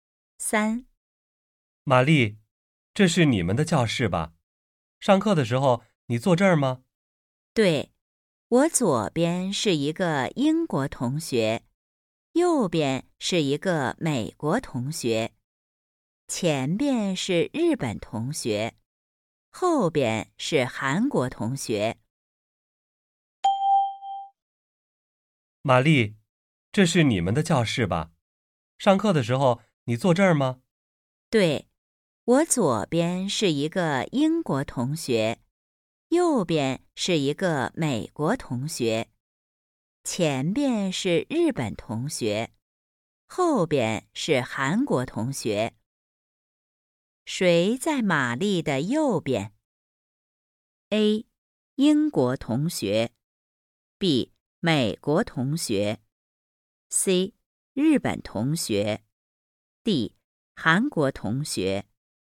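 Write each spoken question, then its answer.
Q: 谁在玛丽的右边?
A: B: 美国同学。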